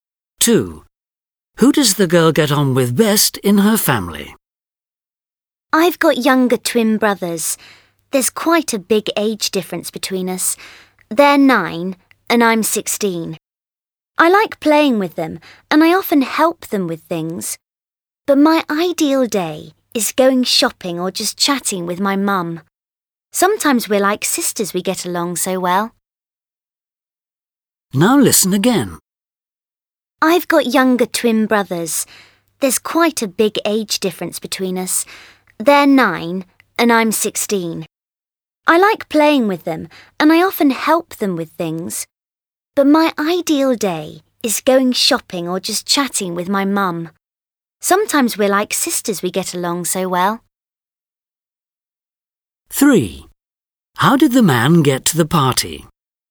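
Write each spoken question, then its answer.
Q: Who does the girl get on with best in her family?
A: Her mum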